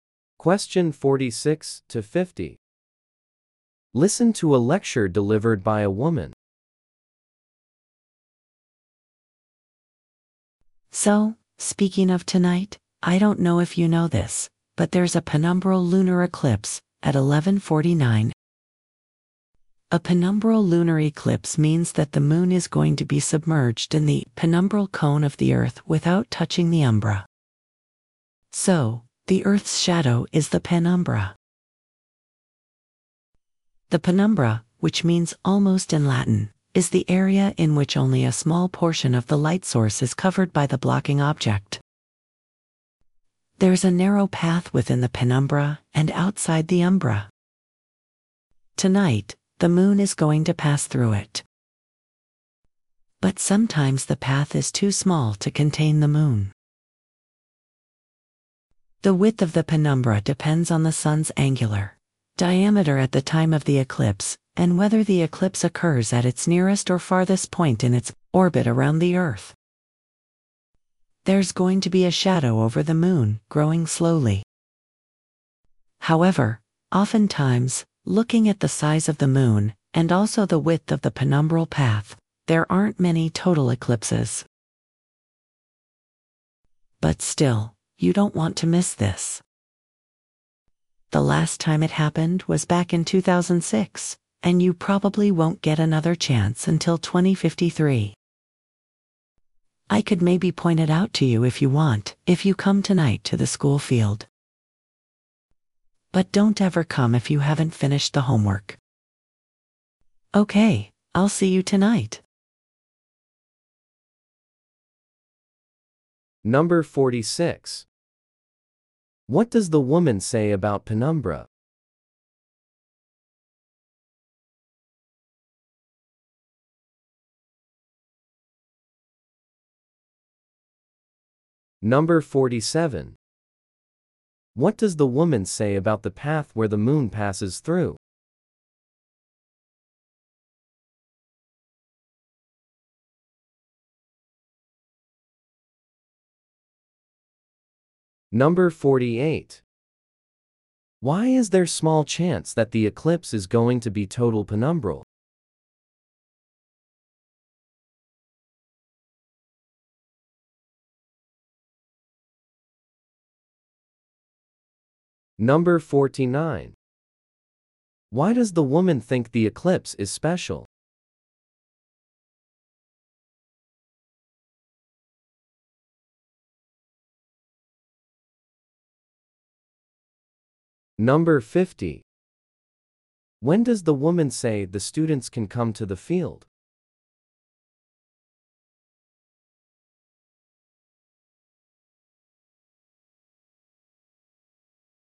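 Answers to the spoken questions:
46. It is the area where only a small portion of the light source is covered by the blocking object; the word means "almost" in Latin.
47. It is a narrow path within the penumbra and outside the umbra, and it is sometimes too small to contain the moon.
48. Because of the size of the moon compared with the width of the penumbral path.
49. It last happened in 2006 and may not happen again until 2053.
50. Tonight, once they have finished their homework.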